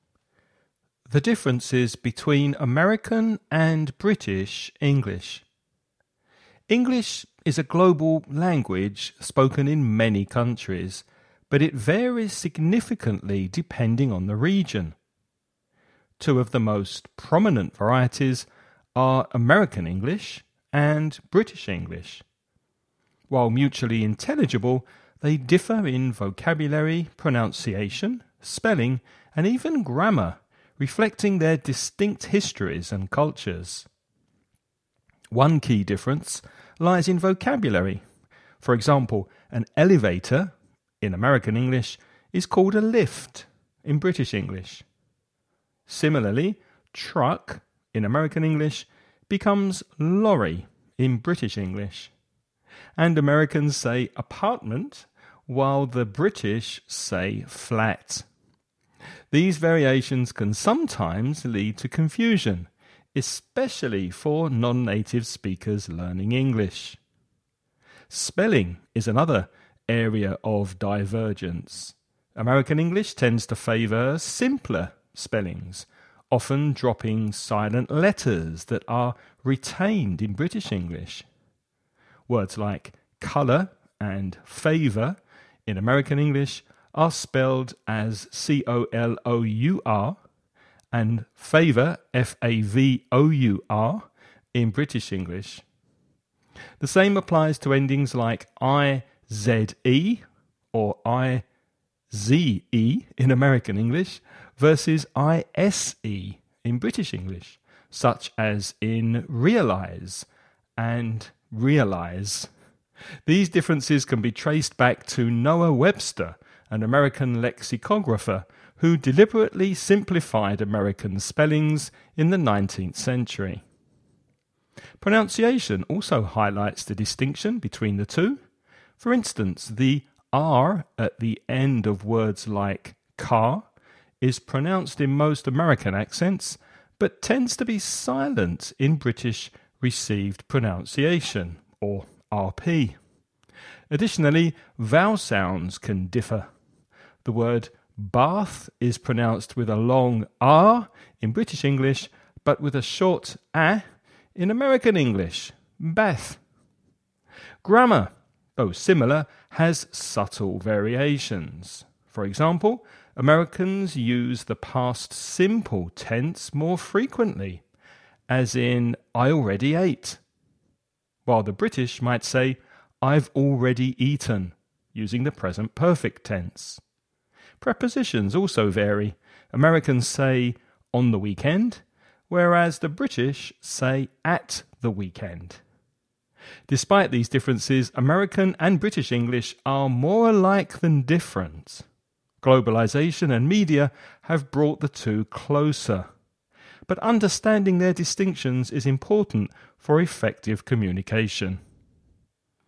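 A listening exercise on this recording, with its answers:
You're going to listen to a man talking about the differences between American and British English. Before you listen, read the following questions.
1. What is the British English equivalent of the word "elevator" in American English?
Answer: lift

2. How does American spelling of "color" differ from British spelling?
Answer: American English drops the silent u; British spells it c-o-l-o-u-r

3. What role did Noah Webster play in the differences between American and British spellings?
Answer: He was an American lexicographer who deliberately simplified American spellings in the 19th century

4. How is the pronunciation of the word "car" different in American and British English?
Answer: The final r is pronounced in most American accents but tends to be silent in British RP

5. What tense do Americans prefer when saying "I already ate," compared to how the British might say it?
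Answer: The past simple; the British might use the present perfect (I've already eaten)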